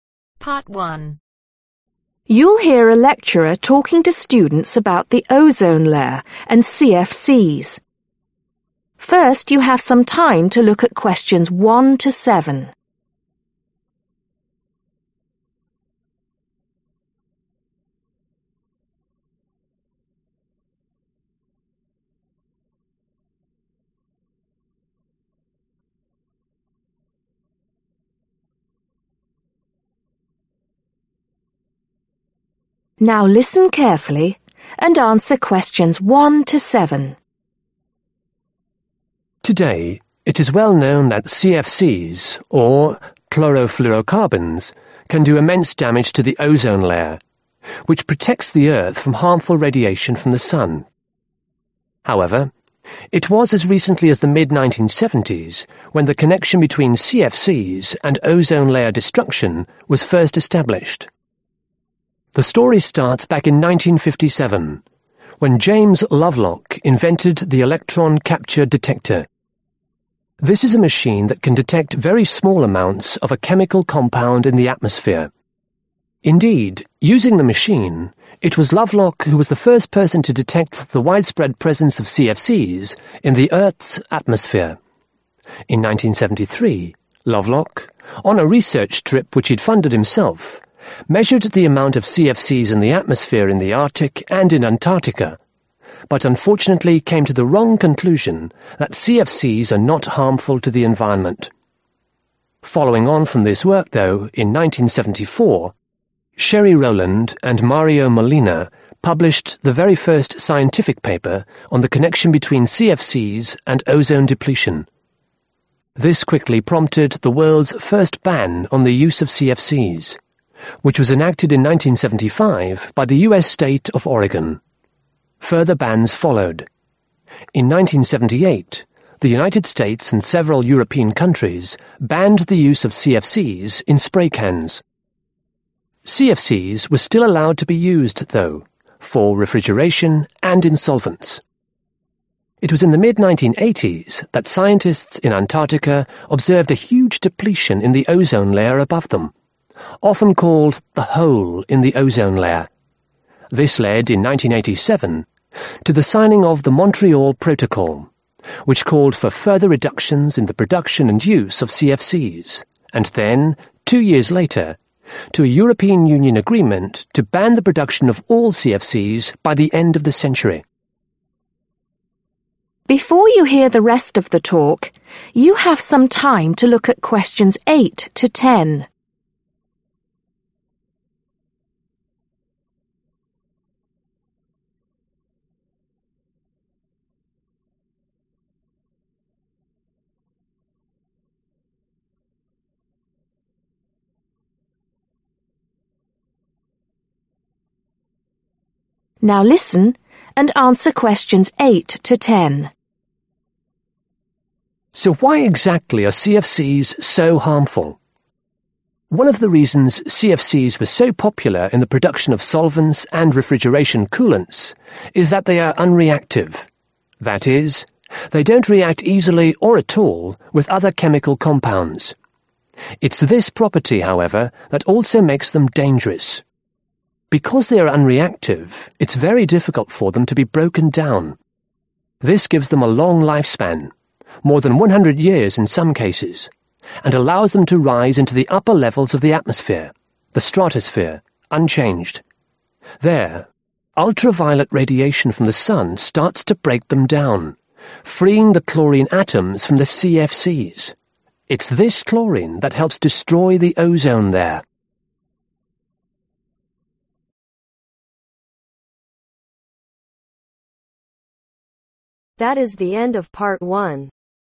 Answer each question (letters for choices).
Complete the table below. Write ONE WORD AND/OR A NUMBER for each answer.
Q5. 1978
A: Spray

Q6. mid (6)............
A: 1980s

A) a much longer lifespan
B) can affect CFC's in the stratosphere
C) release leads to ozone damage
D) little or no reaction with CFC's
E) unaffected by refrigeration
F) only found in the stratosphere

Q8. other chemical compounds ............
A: D

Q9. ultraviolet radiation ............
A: B

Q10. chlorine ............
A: C